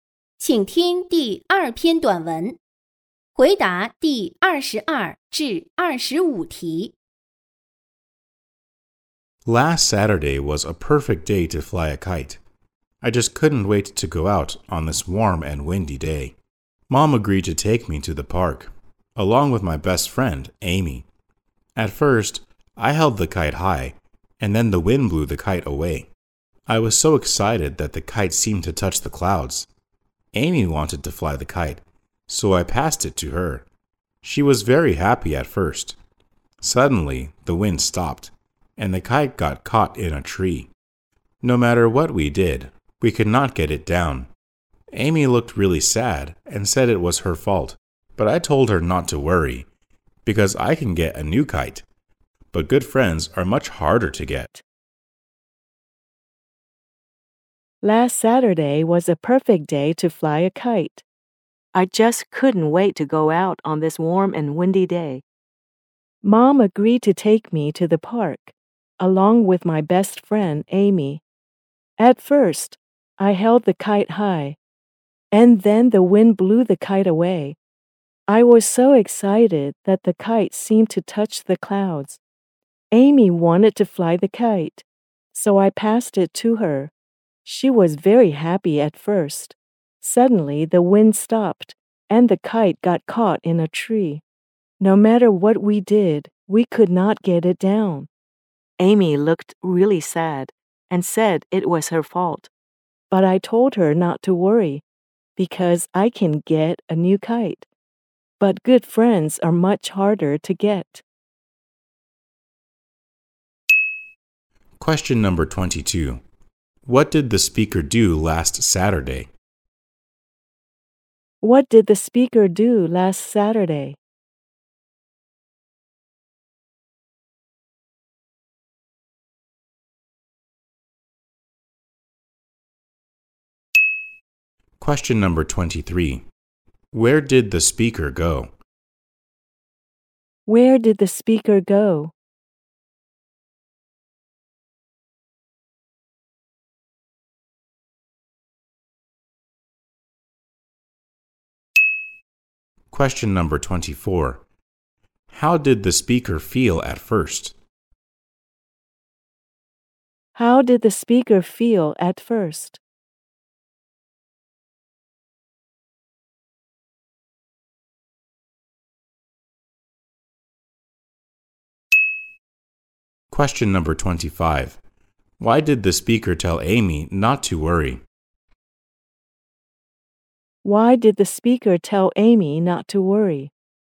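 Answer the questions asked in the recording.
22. Flew a kite
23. To the park
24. Excited
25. Because a new kite is easy to get, but good friends are much harder to get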